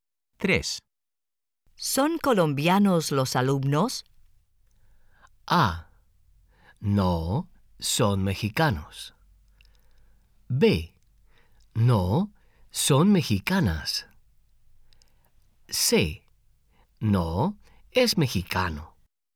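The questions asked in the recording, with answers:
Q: ¿Son colombianos los alumnos?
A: A: No, son mexicanos.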